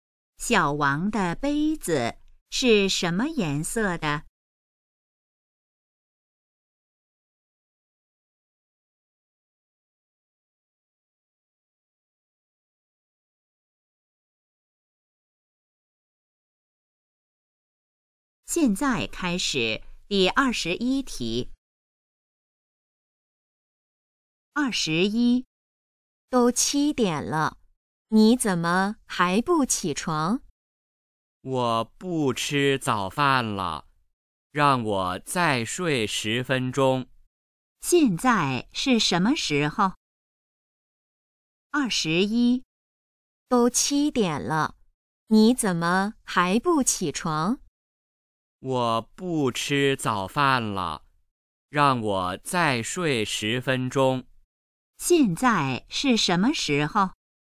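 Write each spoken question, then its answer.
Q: 现在是什么时候?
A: 早上7点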